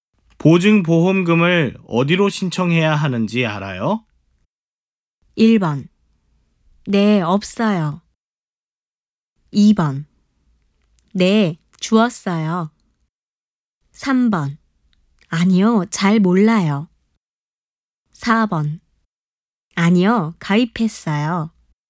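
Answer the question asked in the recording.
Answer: 3번: 아니요, 잘 몰라요.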